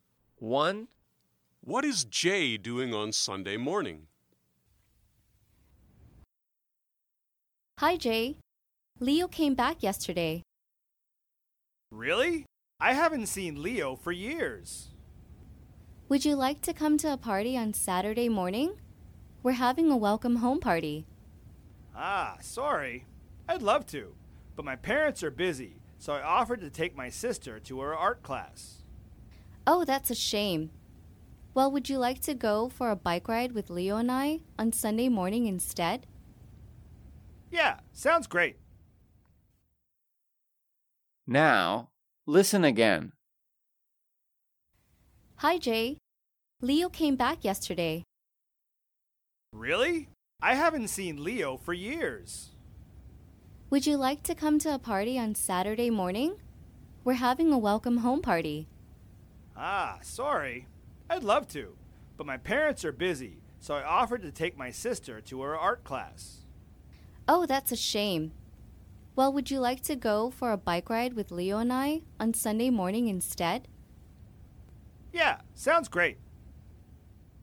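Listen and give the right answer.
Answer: going for a bike ride with Leo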